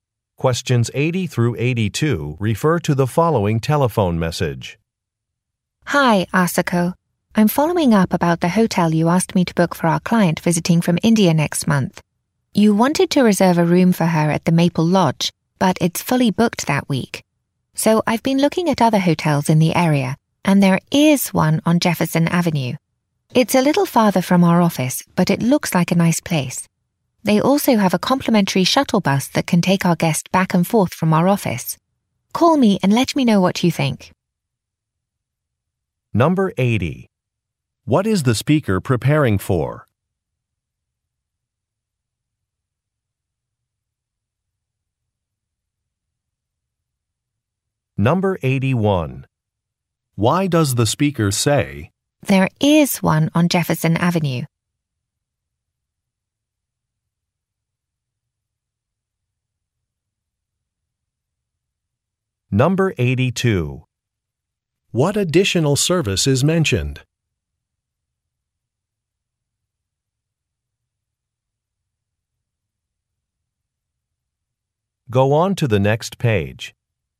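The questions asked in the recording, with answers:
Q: What is the speaker preparing for?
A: A client's visit from India

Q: What additional service is mentioned?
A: A free shuttle bus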